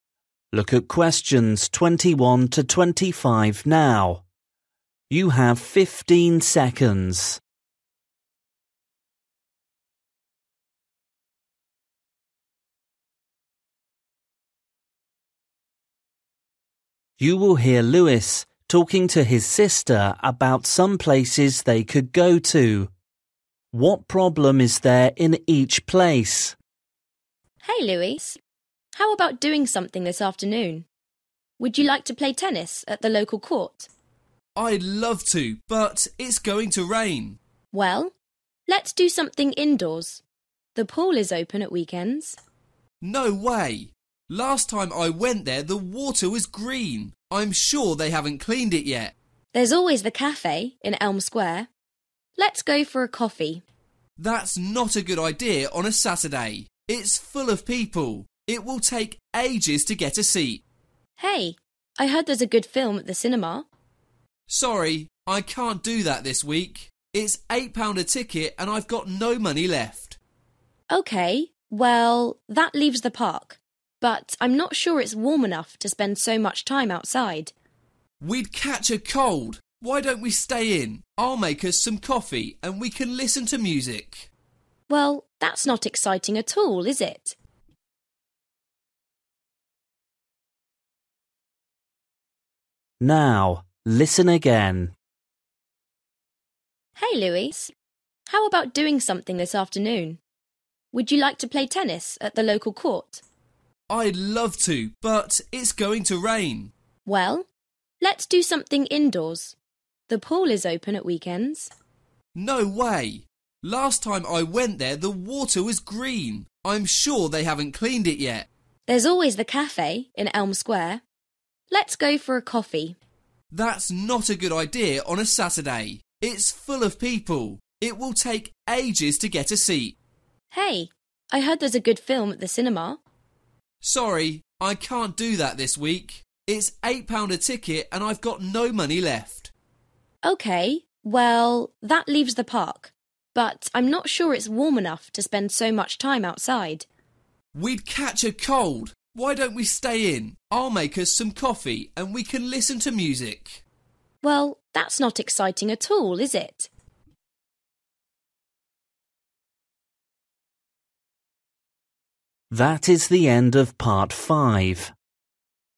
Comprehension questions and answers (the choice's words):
For each question, choose the correct answer.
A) wet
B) noisy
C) cold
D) dirty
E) busy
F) warm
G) expensive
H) boring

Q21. swimming pool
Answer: dirty

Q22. cafe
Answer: busy

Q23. cinema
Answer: expensive

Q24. park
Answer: cold

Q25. home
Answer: boring

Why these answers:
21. No way! Last time I went there the water was green! I'm sure they haven't cleaned it yet!
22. It's full of people! It will take ages to get a seat!
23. It's £8 a ticket and I've got no money left.
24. We'd catch a cold.
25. Well, that's not exciting at all, is it?

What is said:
How about doing something this afternoon? Would you like to play tennis at the local court?
B: I'd love to but it's going to rain.
G: Well, let's do something indoors. (21) The pool is open at weekends.
B: (21) No way! Last time I went there the water was green! I'm sure they haven't cleaned it yet!
G: There's always (22) the cafe in Elm Square. Let's go for a coffee.
B: That's not a good idea on a Saturday! (22) It's full of people! It will take ages to get a seat!
G: Hey! (23) I heard there's a good film at the cinema.
B: Sorry, I can't do that this week. (23) It's £8 a ticket and I've got no money left.
G: OK. Well, that leaves (24) the park, but I'm not sure it's warm enough to spend so much time outside.
B: (24) We'd catch a cold. (25) Why don't we stay in? I'll make us some coffee and we can listen to music!
G: (25) Well, that's not exciting at all, is it?

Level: KET (A2)